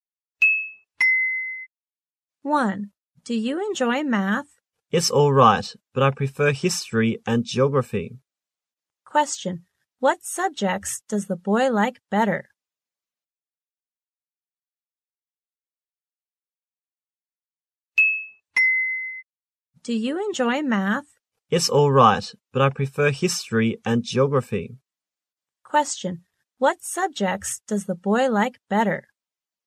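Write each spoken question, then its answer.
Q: What subjects does the boy like better?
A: History and geography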